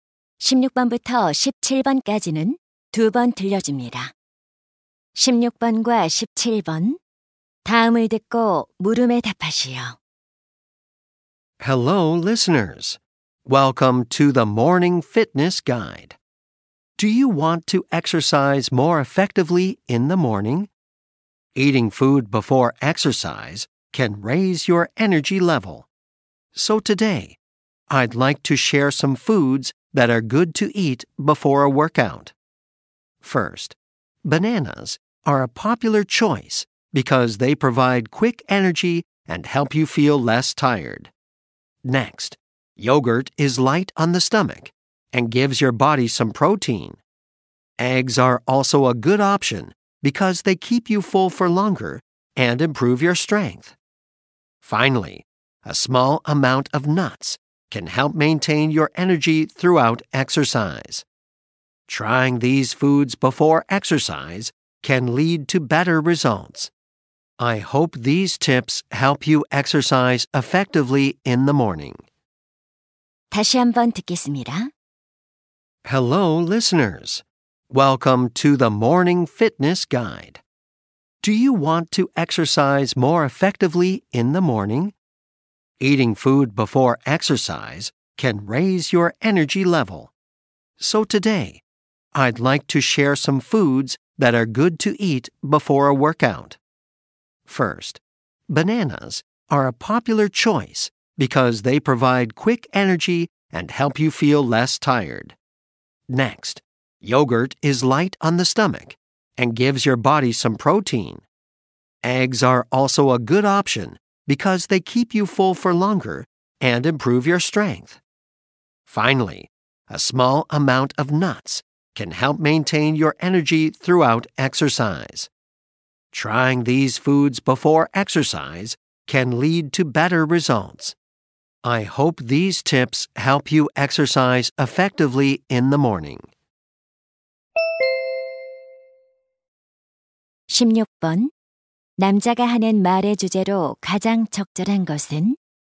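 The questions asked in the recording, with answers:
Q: 남자가 하는 말의 주제로 가장 적절한 것은?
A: 운동 전에 먹기 좋은 음식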